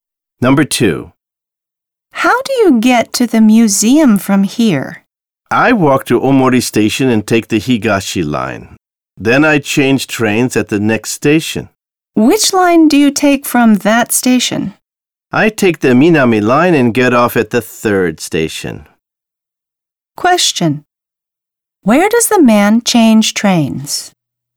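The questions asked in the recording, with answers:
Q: Where does the man change trains?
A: At the next station after Omori Station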